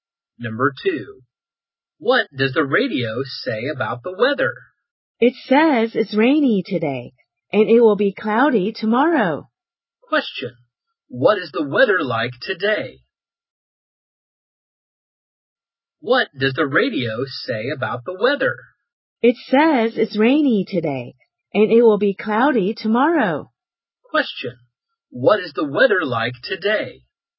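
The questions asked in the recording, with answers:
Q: what is the weather like today?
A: Rainy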